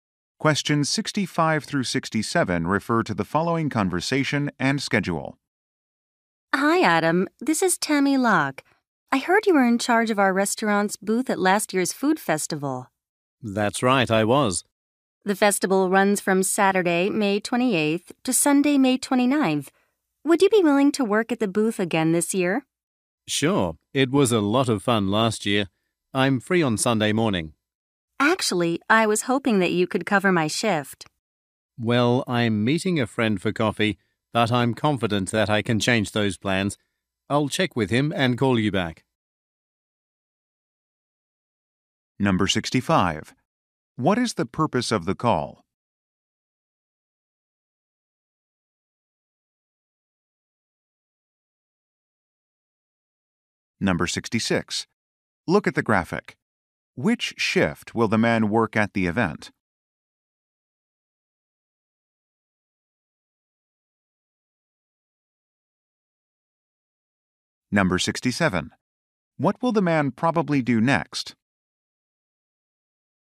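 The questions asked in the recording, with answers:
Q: What is the purpose of the call?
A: To ask the man to work at the festival booth

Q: What will the man probably do next?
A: Contact his friend to change plans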